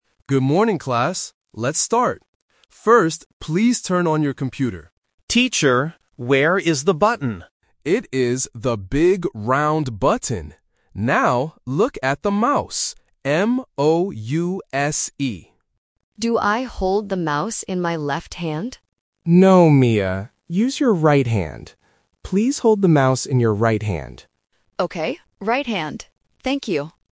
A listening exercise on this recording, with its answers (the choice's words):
Listen to the conversation and choose the correct answer (A, B, or C).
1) What does the teacher tell the students to turn on?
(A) The TV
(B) The computer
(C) The phone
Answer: The computer

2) How does the teacher spell the word "mouse"?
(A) M-A-U-S-E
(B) M-O-U-C-E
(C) M-O-U-S-E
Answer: M-O-U-S-E

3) Which hand should the students use to hold the mouse?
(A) Left hand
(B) Right hand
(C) Both hands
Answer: Right hand

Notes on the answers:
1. The correct answer is B. The teacher clearly says, "First, please turn on your computer". Options A and C are plausible technology words but are not mentioned in the audio.
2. The correct answer is C. The teacher spells the word clearly: "M-O-U-S-E". Option A (M-A-U-S-E) is a trap because "O" and "A" can be confusing for beginners. Option B (M-O-U-C-E) is a trap because the letter "C" can sometimes sound like "S".
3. The correct answer is B. The teacher tells Mia, "Use your right hand". Option A (Left hand) is the trap because Mia asks "in my left hand?" but the teacher says "No". Option C (Both hands) is not mentioned.

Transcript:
Teacher: Good morning, class. Let's start. First, please turn on your computer.
Leo: Teacher, where is the button?
Teacher: It is the big round button. Now, look at the mouse. M-O-U-S-E.
Mia: Do I hold the mouse in my left hand?
Teacher: No, Mia. Use your right hand. Please hold the mouse in your right hand.
Mia: Okay, right hand. Thank you.

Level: A1